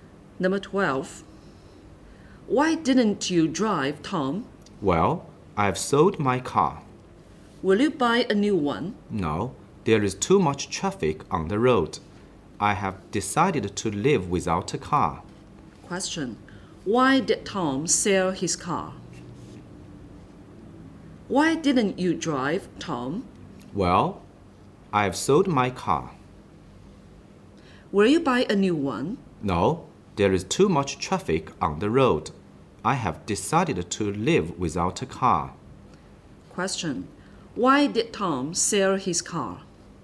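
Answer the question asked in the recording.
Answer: There is too much traffic on the road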